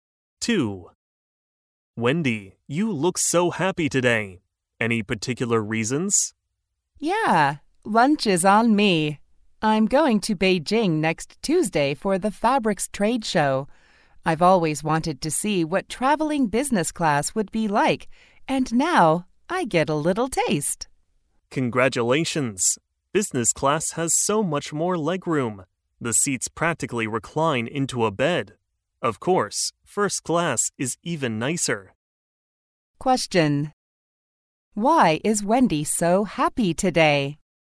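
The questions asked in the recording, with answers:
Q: Why is Wendy so happy today?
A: She is flying business class to Beijing for the Fabrics Trade Show next Tuesday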